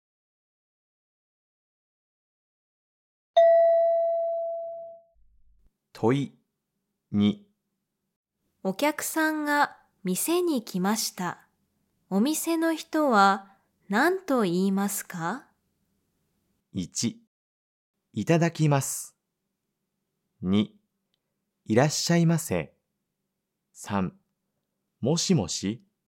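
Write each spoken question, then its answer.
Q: お客さんが店に来ました。お店の人は何と言いますか?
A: 2: いらっしゃいませ。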